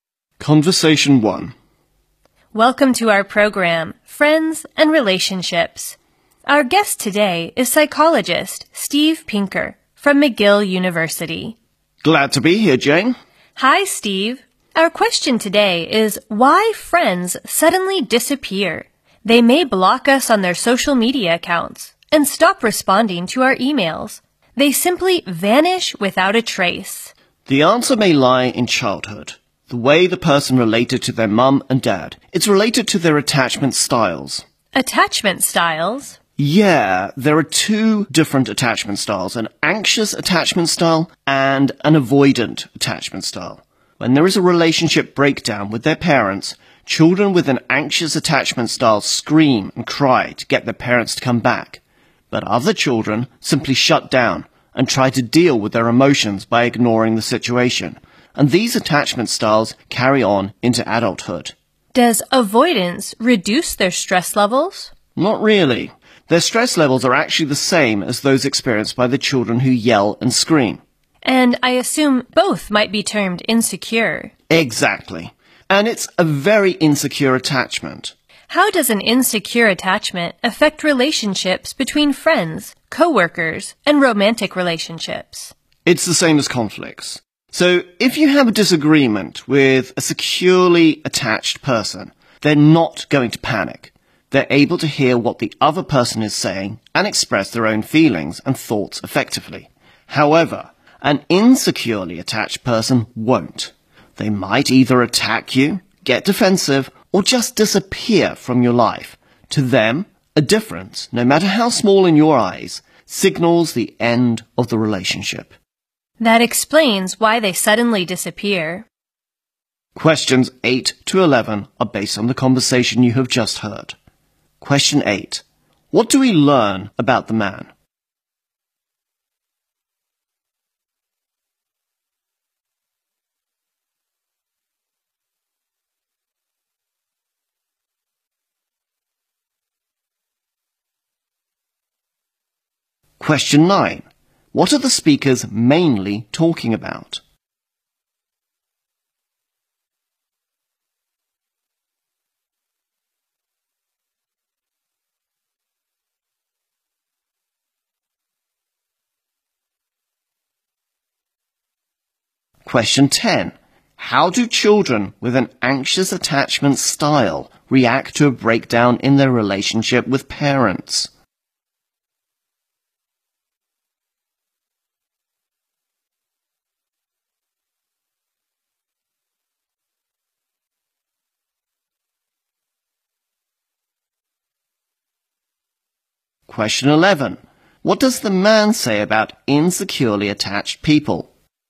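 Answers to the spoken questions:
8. He is a psychologist from McGill University.
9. Why friends suddenly disappear.
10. They scream and cry to get their parents back.
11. They see any small difference as the end of a relationship.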